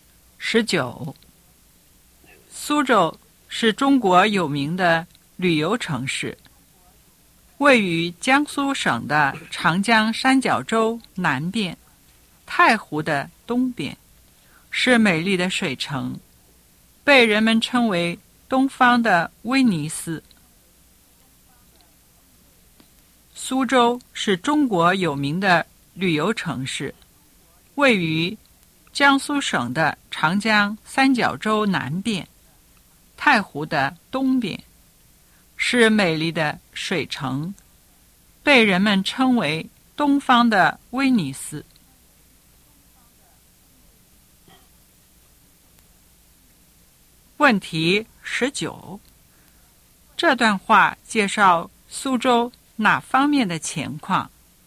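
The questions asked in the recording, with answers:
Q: 这段话介绍苏州哪方面的情况?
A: 地理位置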